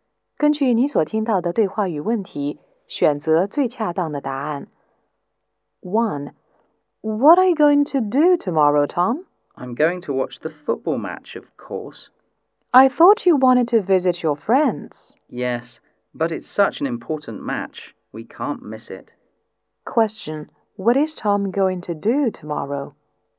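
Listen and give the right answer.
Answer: Watch the football match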